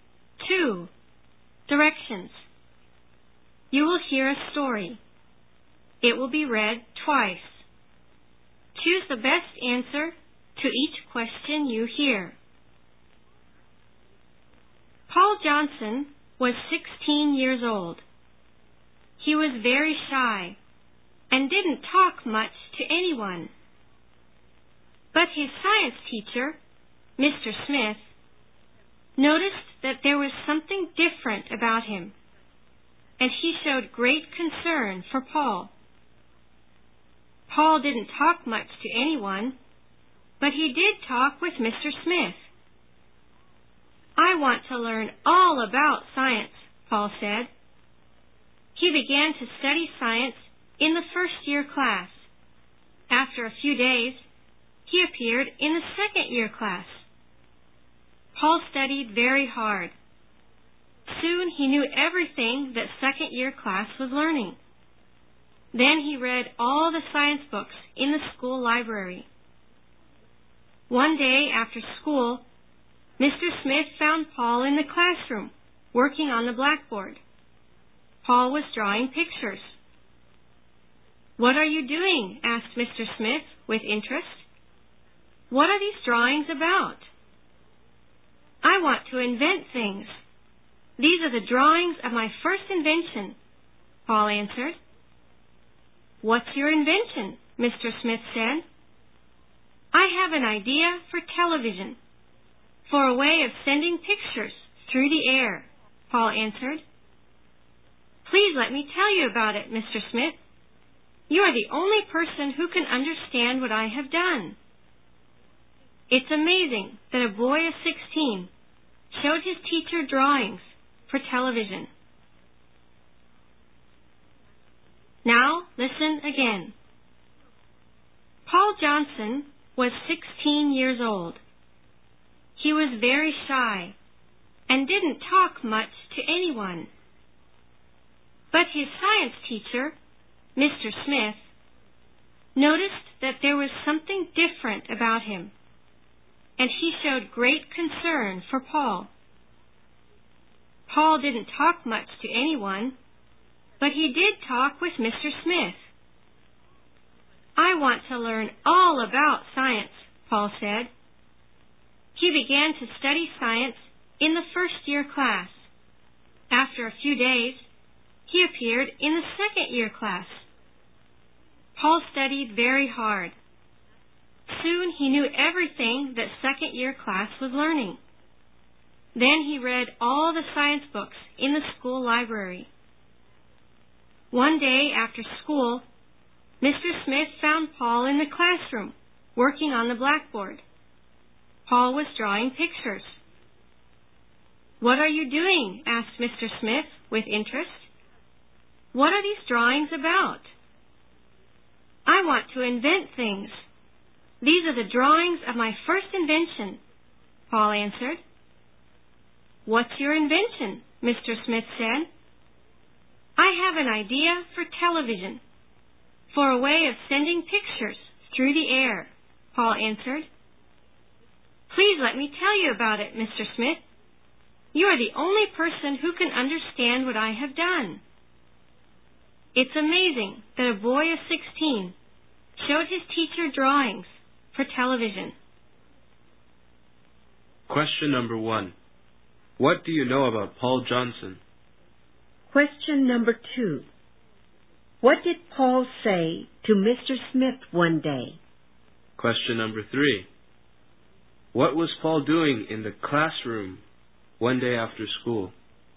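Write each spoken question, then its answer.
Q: What was Paul doing in the classroom one day after school?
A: Drawing pictures of his invention (television) on the blackboard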